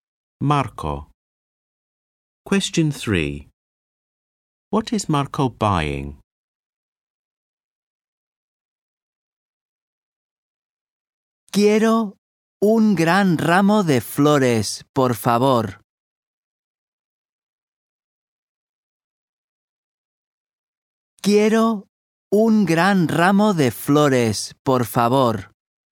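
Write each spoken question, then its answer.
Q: What is Marco buying?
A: A big bunch of flowers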